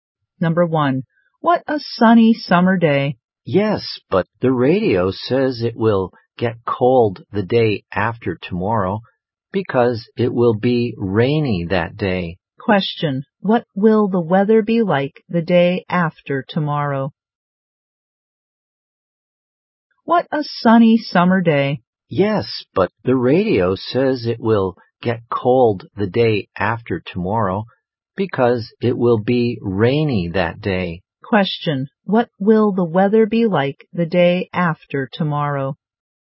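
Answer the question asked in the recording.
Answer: Rainy and cold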